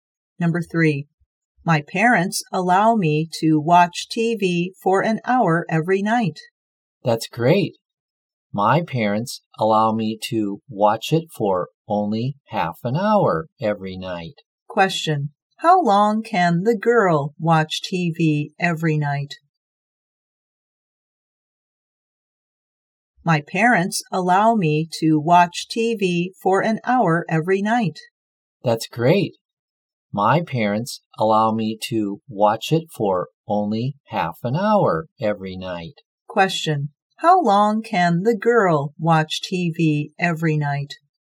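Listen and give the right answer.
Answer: Half an hour.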